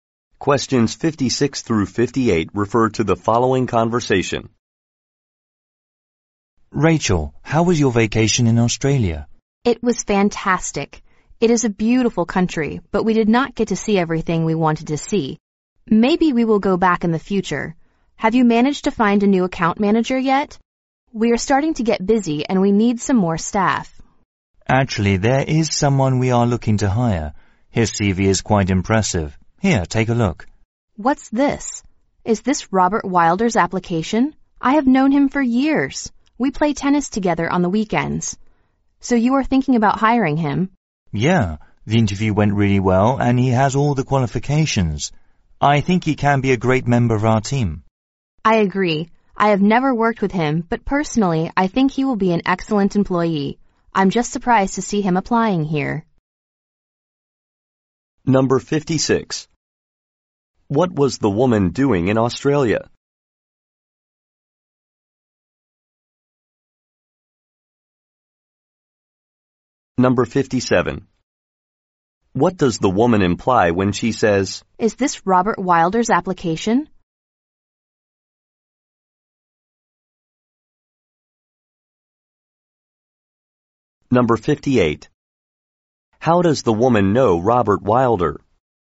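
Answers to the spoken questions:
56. Taking a vacation
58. They play tennis together on weekends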